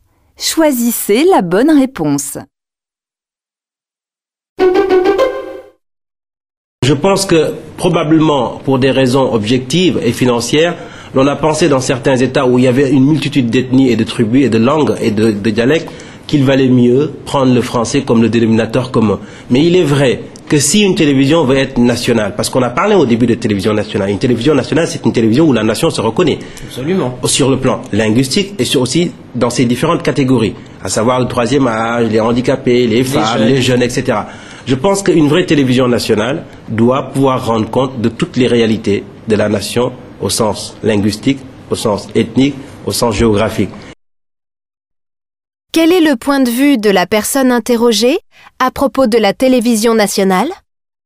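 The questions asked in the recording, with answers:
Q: Quel est le point de vue de la personne interrogée à propos de la télévision nationale ?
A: Une vraie télévision nationale doit refléter toutes les réalités de la nation (linguistiques, ethniques, géographiques) pour que la nation s'y reconnaisse.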